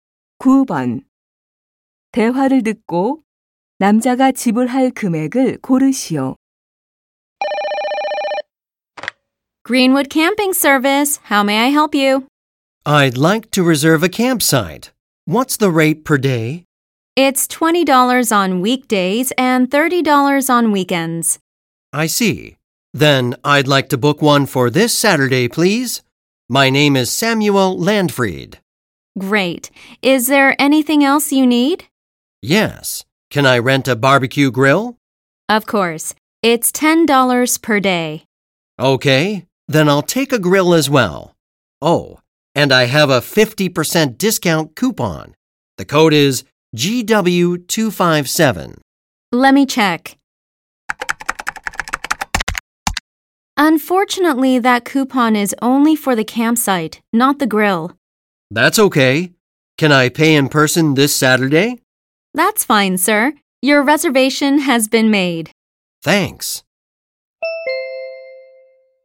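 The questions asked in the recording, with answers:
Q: 대화를 듣고 남자가 지불할 금액을 고르시오.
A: $25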